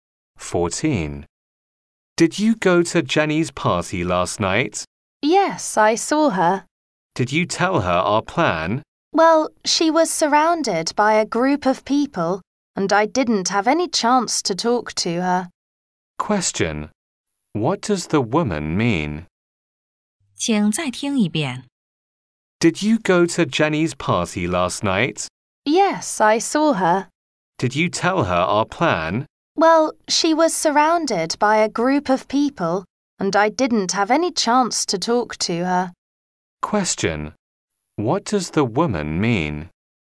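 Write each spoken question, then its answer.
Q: What does the woman mean?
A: She didn't get a chance to tell Jenny their plan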